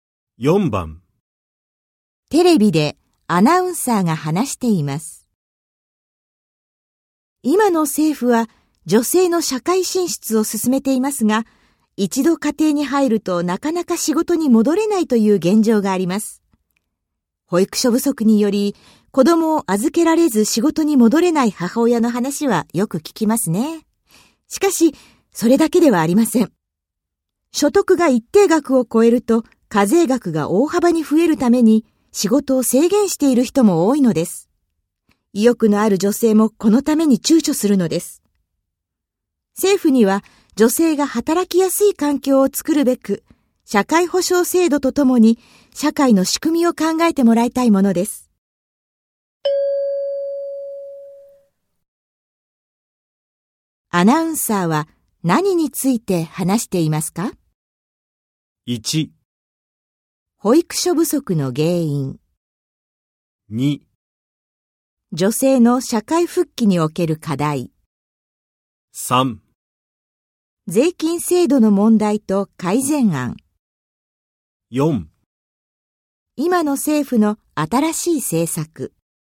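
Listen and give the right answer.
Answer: 2: 女性の社会復帰における課題。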